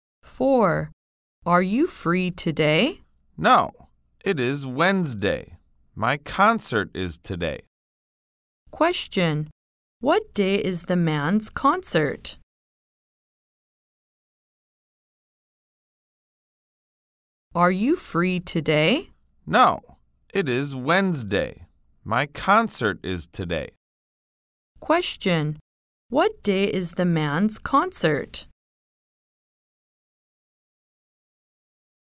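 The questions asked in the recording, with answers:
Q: Question. What day is the man's concert?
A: Wednesday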